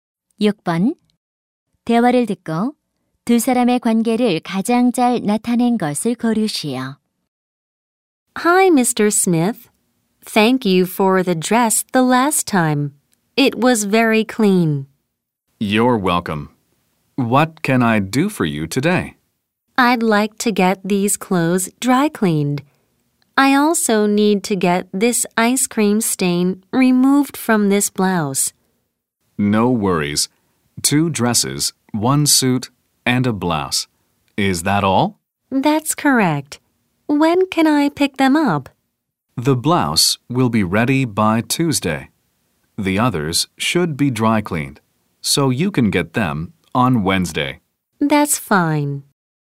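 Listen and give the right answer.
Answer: 손님 - 세탁소 주인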